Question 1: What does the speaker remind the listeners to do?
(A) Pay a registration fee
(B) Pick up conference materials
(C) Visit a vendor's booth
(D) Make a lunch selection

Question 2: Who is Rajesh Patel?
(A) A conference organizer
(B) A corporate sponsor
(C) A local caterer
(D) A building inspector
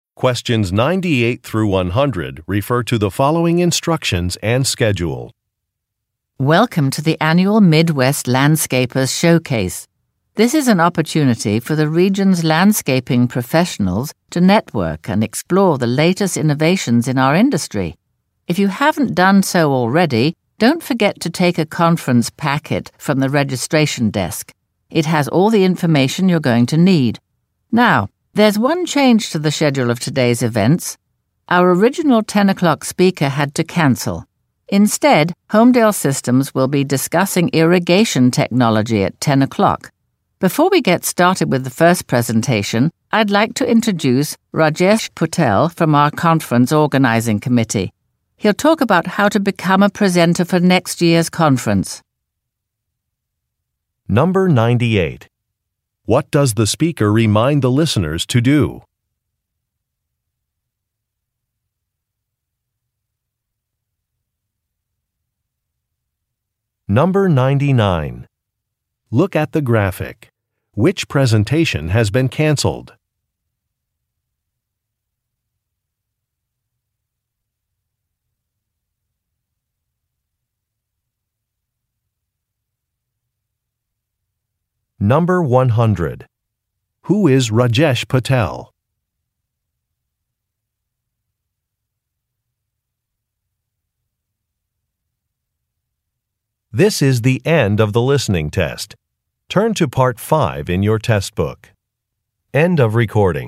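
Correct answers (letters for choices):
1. B
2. A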